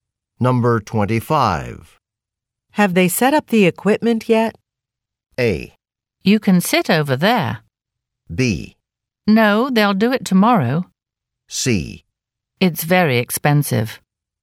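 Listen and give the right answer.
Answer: B: No, they'll do it tomorrow.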